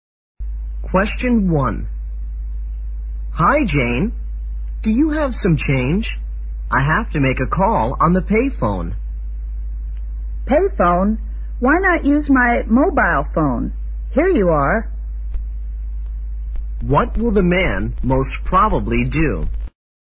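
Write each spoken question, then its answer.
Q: What will the man most probably do?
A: Use the woman's mobile phone to make the call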